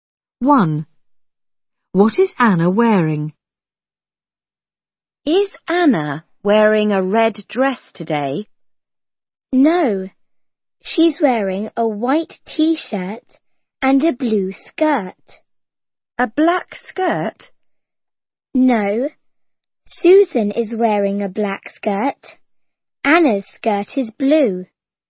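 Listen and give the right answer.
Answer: A white t-shirt and a blue skirt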